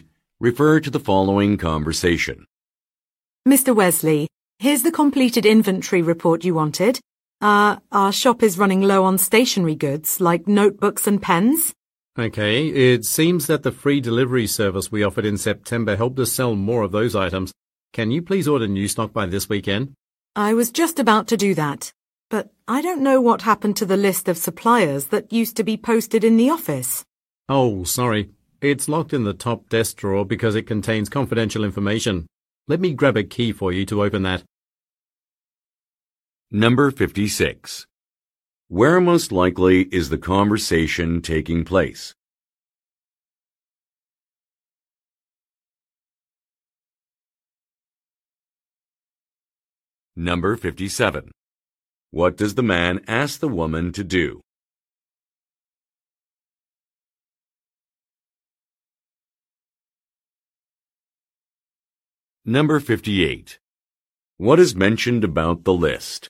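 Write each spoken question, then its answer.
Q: Where most likely is the conversation taking place?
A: At a shop that sells stationery

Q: What does the man ask the woman to do?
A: Order new stock by this weekend

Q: What is mentioned about the list?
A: It is locked in the top desk drawer because it contains confidential information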